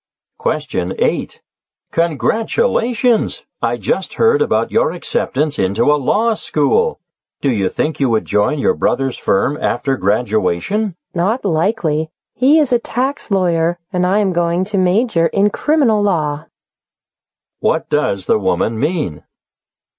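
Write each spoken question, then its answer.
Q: What does the woman mean?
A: She probably won't join her brother's firm because she will study criminal law, not tax law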